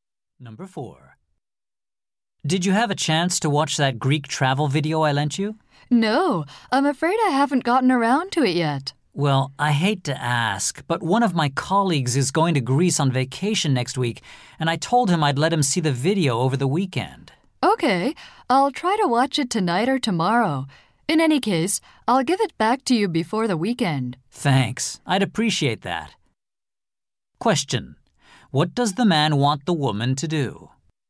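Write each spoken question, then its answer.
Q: What does the man want the woman to do?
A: Return the video before the weekend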